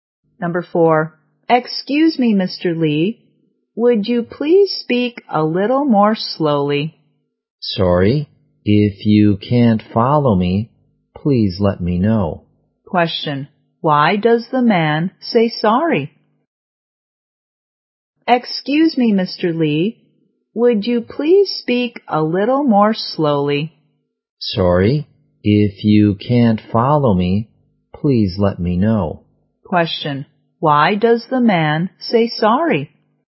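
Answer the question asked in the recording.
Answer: He spoke too fast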